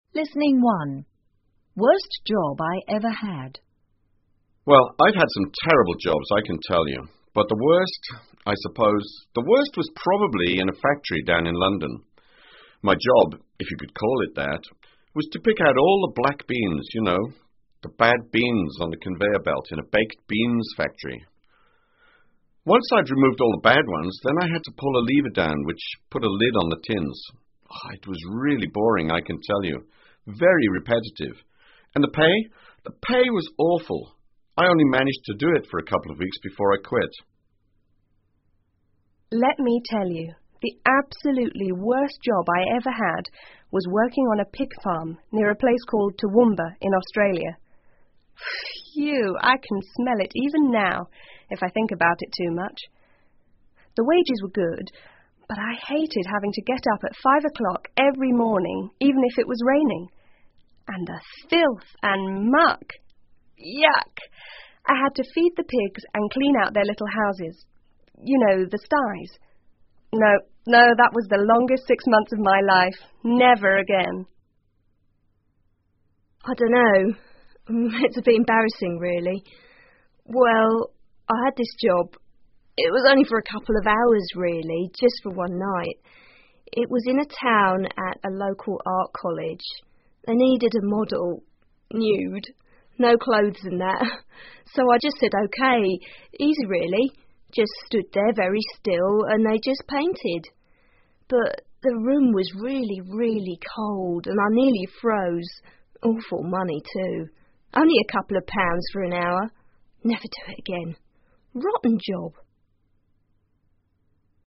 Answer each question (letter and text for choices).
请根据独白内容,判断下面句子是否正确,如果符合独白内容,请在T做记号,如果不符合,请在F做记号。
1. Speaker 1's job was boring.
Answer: T

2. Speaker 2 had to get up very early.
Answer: T

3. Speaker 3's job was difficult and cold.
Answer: F

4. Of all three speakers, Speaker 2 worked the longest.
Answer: T

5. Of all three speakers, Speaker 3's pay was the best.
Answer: F

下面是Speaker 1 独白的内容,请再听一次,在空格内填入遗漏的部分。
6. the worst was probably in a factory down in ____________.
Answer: London

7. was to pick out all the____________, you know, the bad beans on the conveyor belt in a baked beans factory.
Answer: black beans

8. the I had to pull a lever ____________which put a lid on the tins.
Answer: down

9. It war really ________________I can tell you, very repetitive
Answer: boring

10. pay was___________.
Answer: awful

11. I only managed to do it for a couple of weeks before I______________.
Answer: quit

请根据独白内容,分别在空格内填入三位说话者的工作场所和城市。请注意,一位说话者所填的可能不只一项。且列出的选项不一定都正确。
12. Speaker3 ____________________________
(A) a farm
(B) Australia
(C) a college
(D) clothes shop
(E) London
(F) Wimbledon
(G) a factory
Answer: (C) a college

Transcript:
Well,I've had some terrible jobs I can tell you,but the worst...I suppose...the worst was probably in a factory down in London.My job...if you could call it that...was to pick out all the black beans,you know,the bad beans on the conveyor belt in a baked beans factory.Once I'd removed all the bad ones,then I had to pull a lever down which put a lid on the tins.It was really boring I can tell you,very repetitive...and the pay...the pay was awful.I only managed to do it for a couple of weeks before I quit.
Let me tell you...the absolutely worst job I ever had was working on a pig farm near a place called Toowoomba,in Australia...Phew!I can smell it even now,if I think about it too much.The wages were good,but I hated having to get up at 5 o'clock every morning,even if it was raining...and the filth and muck...Yuck!I had to feed the pigs and clean out their little houses...you know,the sites...No,no,that was the longest six months of my life...never again!
I don't know...It's a bit embarrassing really...Well,I had this job...it was only for a couple of hours really...just for one night.It was in a town at a local art college.They needed a model...nude...no clothes and that...so I just said OK.Easy really...just stood there very still and they just painted.But,the room was really,really cold and I nearly froze.Awful money too...only a couple of pounds for an hour...never do it again...rotten job.